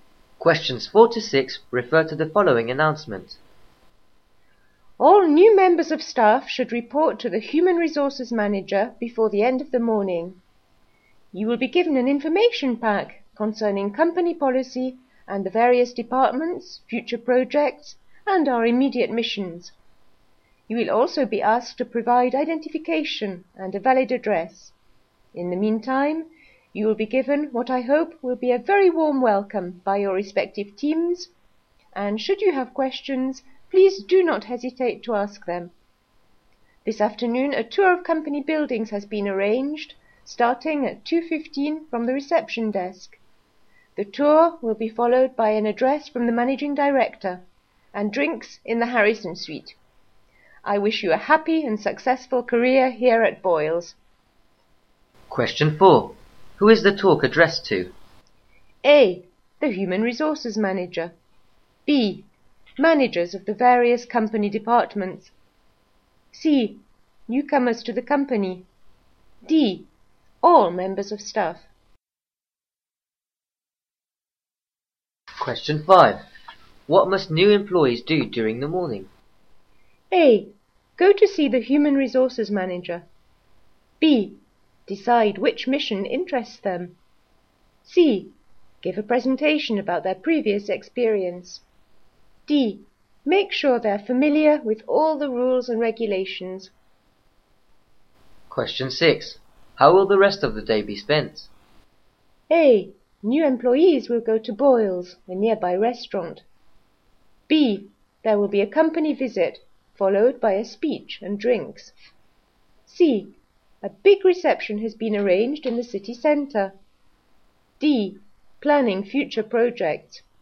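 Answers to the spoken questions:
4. C: Newcomers to the company.
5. A: Go to see the Human Resources Manager.
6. B: There will be a company visit, followed by a speech and drinks.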